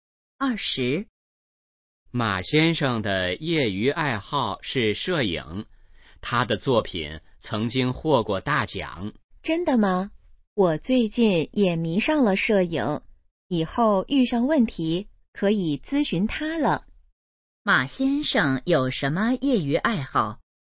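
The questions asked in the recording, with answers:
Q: 马先生有什么业余爱好?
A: 摄影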